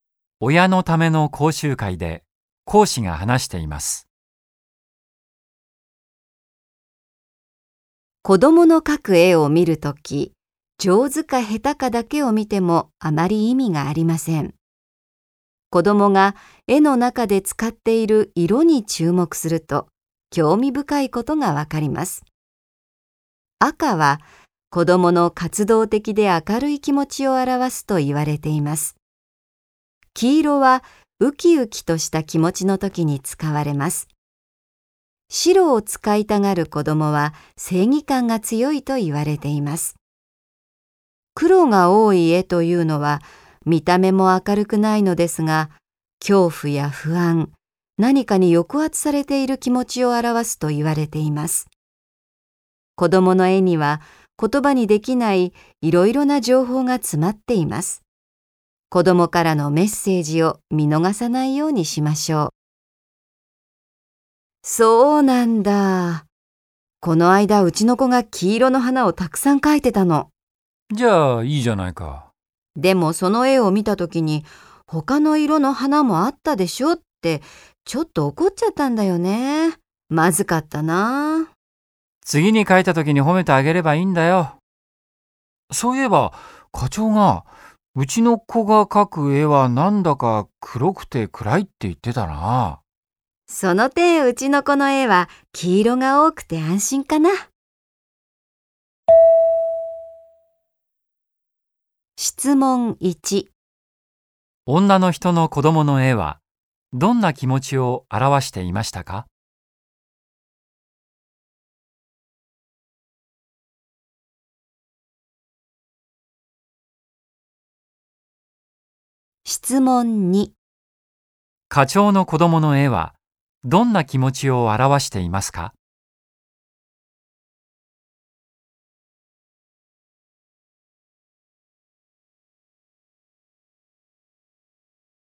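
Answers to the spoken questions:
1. ウキウキとした気持ち
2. 恐怖や不安、何かに抑圧されている気持ち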